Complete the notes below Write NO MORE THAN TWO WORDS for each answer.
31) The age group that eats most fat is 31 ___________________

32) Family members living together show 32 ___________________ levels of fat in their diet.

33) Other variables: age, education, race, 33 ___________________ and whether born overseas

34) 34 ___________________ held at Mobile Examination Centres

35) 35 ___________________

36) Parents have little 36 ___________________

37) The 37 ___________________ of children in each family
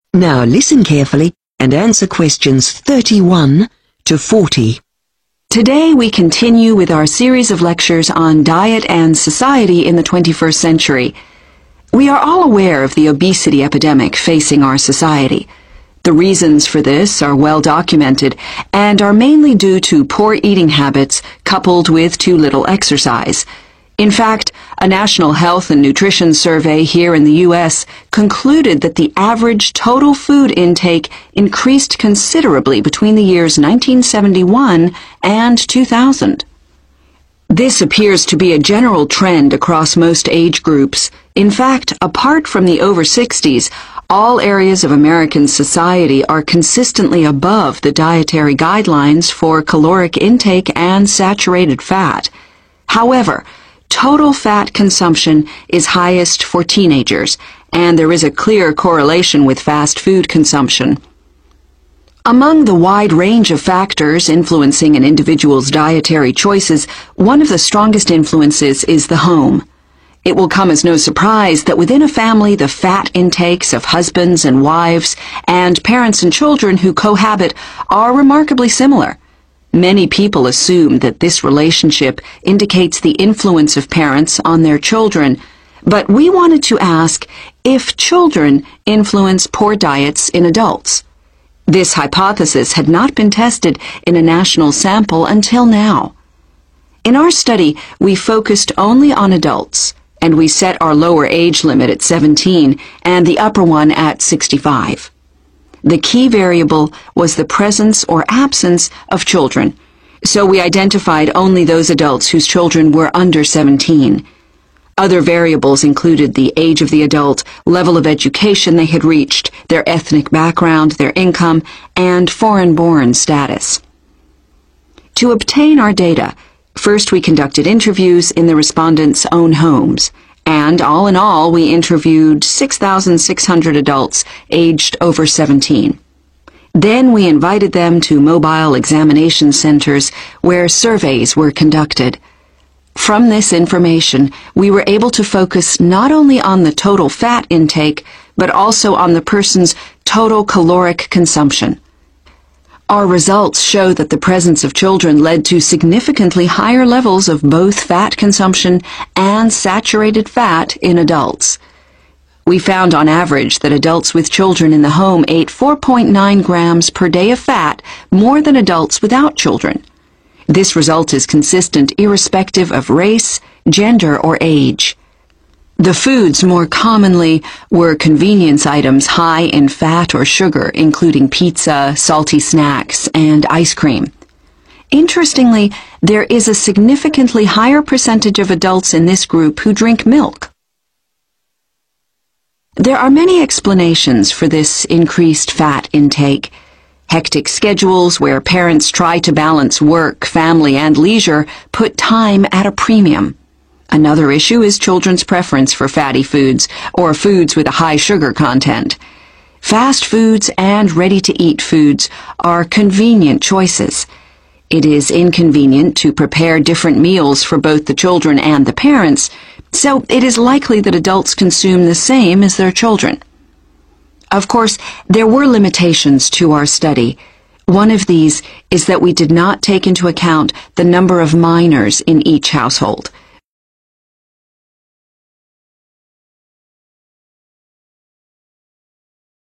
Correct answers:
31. teenagers
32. similar
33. income
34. surveys
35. drink milk
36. time
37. number